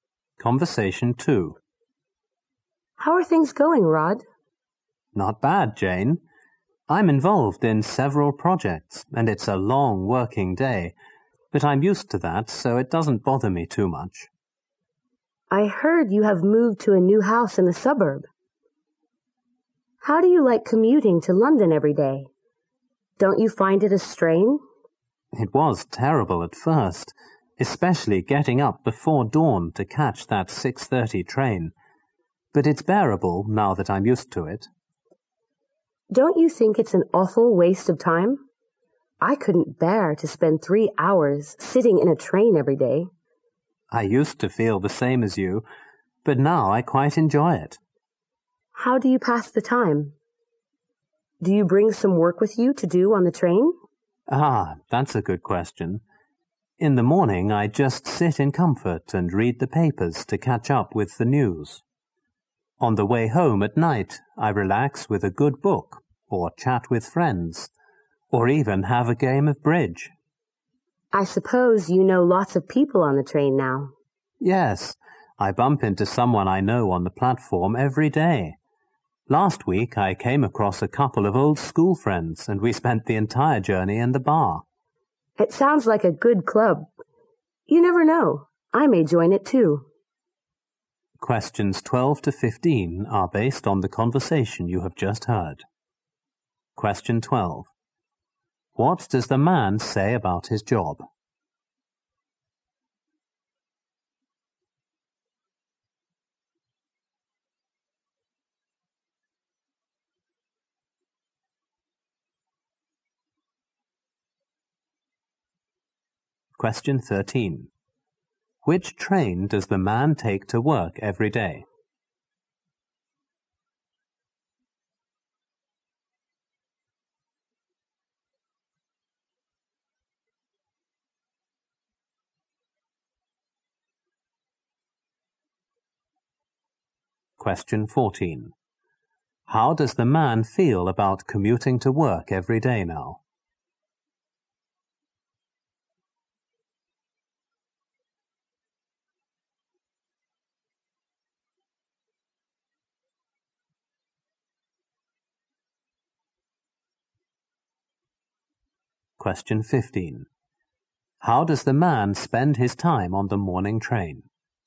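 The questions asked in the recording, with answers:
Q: What does the man say about his job?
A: He works long days on several projects but is used to it.

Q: Which train does the man take to work every day?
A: The 6:30 train.

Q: How does the man feel about commuting to work every day now?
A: He quite enjoys it.

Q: How does the man spend his time on the morning train?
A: Reading the papers.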